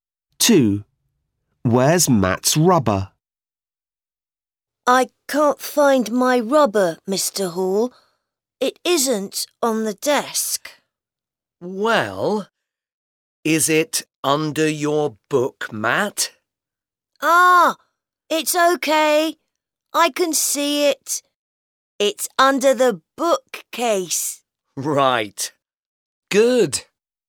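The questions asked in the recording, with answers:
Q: Where's Matt's rubber?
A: Under the bookcase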